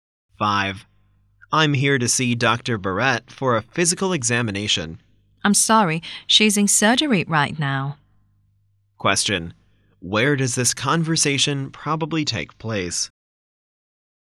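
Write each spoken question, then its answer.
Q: Where does this conversation probably take place?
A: At a hospital.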